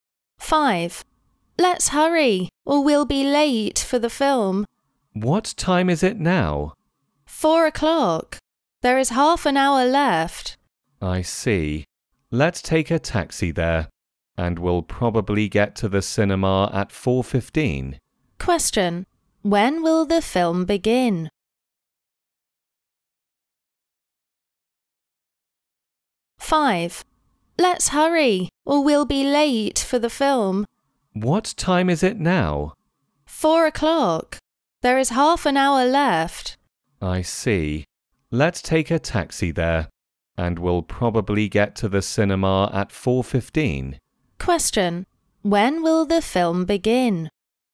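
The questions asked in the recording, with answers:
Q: When will the film begin?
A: At 4:30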